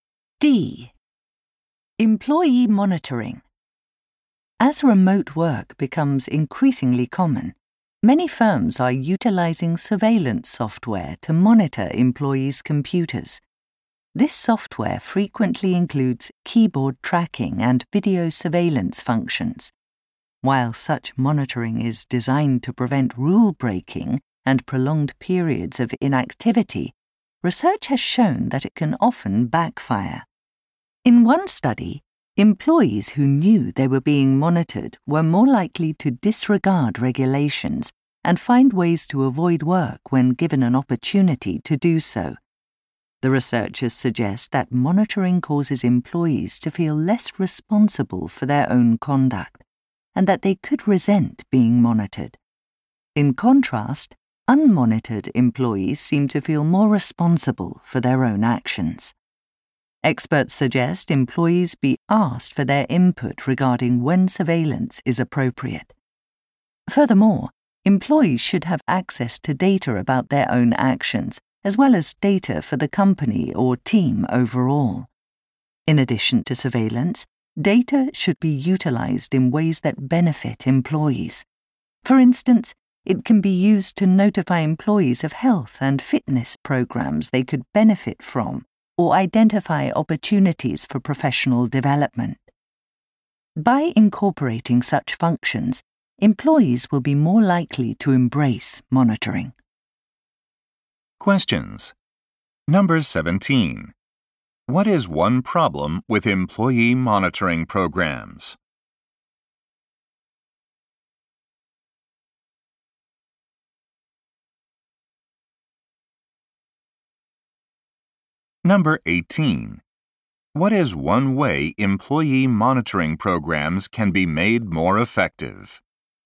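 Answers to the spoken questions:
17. Monitored employees may feel less responsible and break rules or avoid work more
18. Ask employees for input and use data in ways that benefit them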